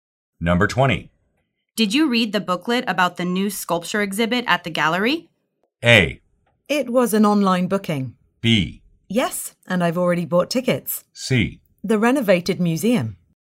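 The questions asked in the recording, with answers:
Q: Did you read the booklet about the new sculpture exhibit at the gallery?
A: B: Yes, and I've already bought tickets.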